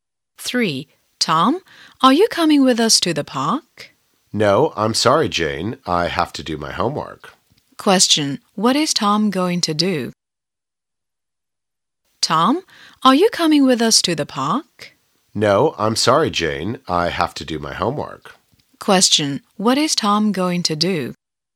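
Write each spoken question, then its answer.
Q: What is Tom going to do?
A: Do his homework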